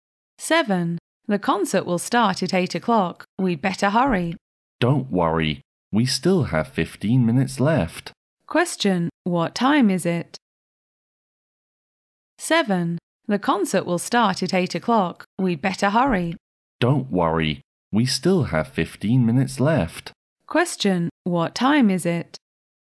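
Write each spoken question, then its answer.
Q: What time is it?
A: 7:45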